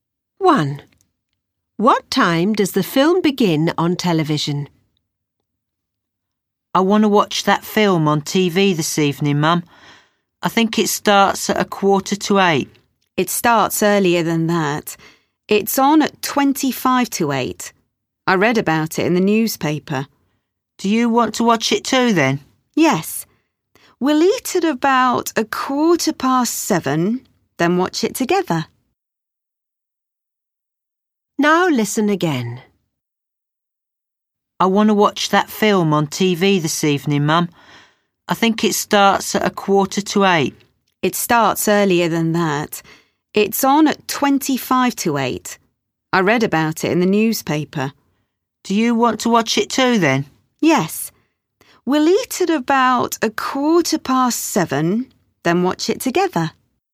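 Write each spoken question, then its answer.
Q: What time does the film begin on television?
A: 7:25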